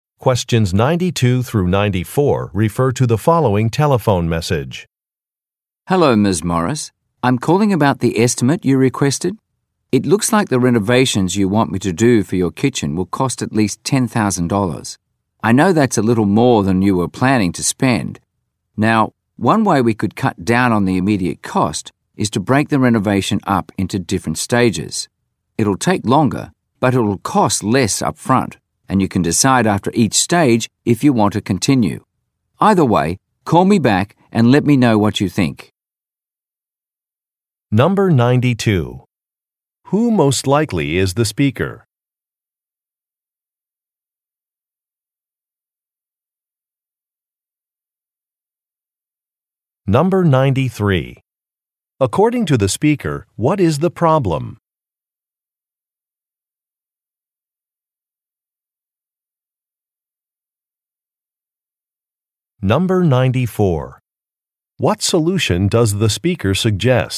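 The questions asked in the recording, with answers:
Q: Who most likely is the speaker?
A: A contractor doing kitchen renovations

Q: According to the speaker, what is the problem?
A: The renovation will cost more than planned

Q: What solution does the speaker suggest?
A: Doing the renovation in stages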